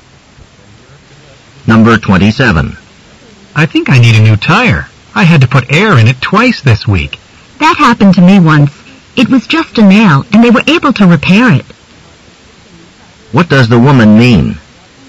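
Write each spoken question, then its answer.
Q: What does the woman mean?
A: The tire may only need a repair, not replacing.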